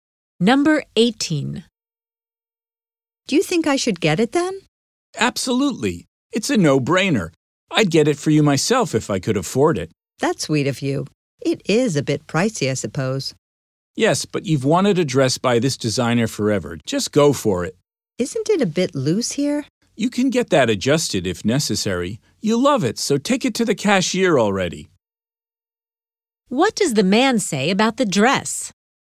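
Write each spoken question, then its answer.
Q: What does the man say about the dress?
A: She should buy it; it can be adjusted if loose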